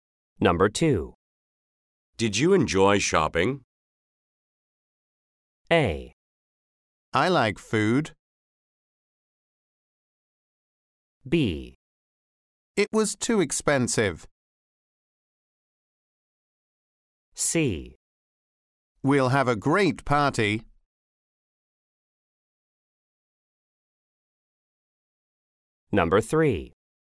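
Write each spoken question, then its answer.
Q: Did you enjoy shopping?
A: B: It was too expensive.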